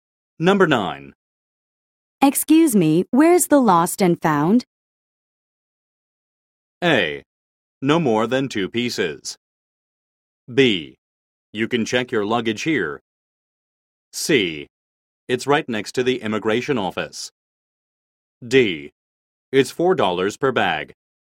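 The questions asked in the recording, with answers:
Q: Excuse me, where's the lost and found?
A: C: It's right next to the immigration office.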